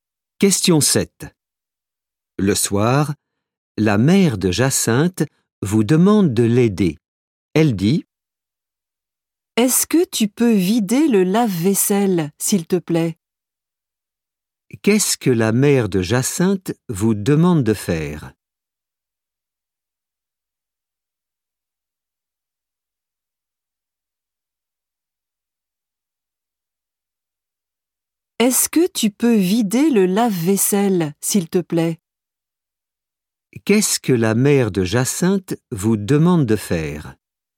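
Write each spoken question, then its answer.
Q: Qu'est-ce que la mère de Jacinthe vous demande de faire ?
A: vider le lave-vaisselle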